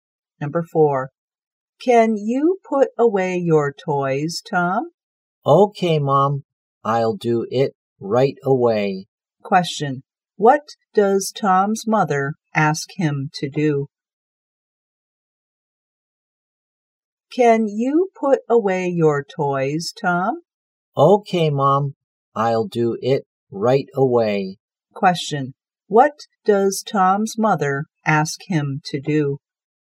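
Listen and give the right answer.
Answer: Put away his toys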